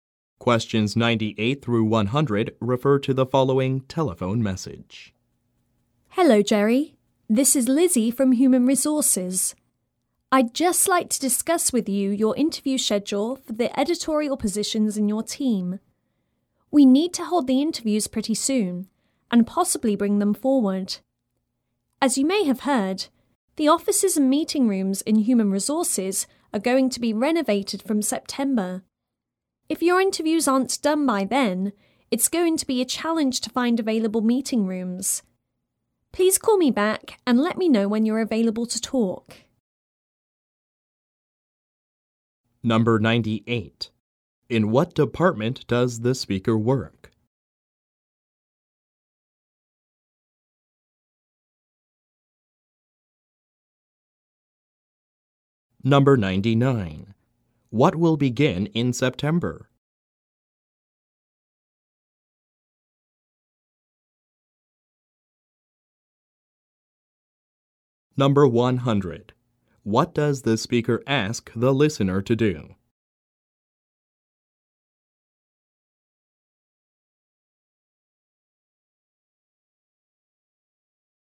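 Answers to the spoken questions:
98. Human Resources
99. Renovation of the Human Resources offices and meeting rooms
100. Call her back to say when he's available to talk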